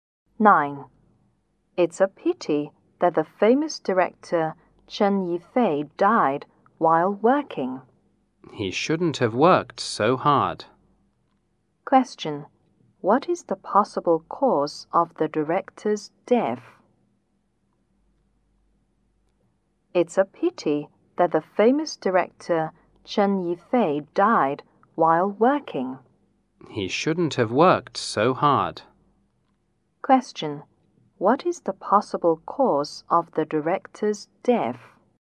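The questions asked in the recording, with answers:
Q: What is the possible cause of the director's death?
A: He worked too hard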